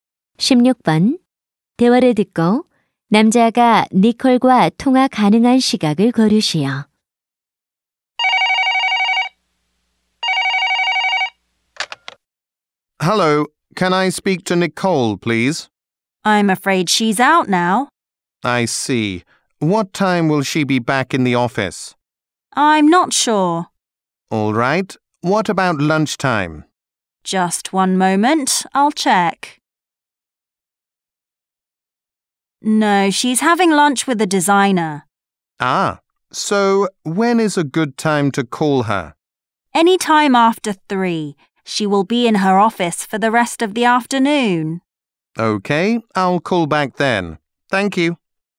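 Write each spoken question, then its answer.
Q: 16번. 대화를 듣고 남자가 니콜과 통화 가능한 시각을 고르시오.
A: 오후 3시 이후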